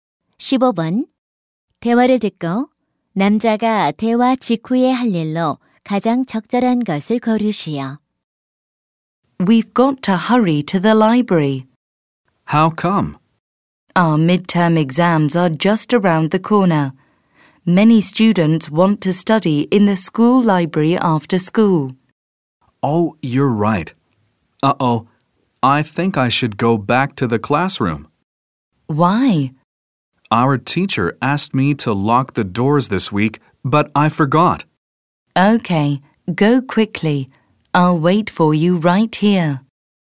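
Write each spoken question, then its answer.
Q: 대화를 듣고 남자가 대화 직후에 할 일로 가장 적절한 것을 고르시오.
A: 교실로 돌아가 문을 잠근다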